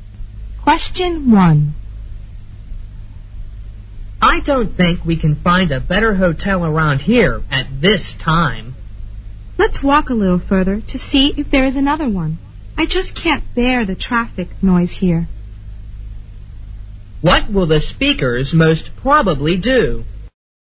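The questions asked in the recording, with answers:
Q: What will the speakers most probably do?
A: Look for another hotel further on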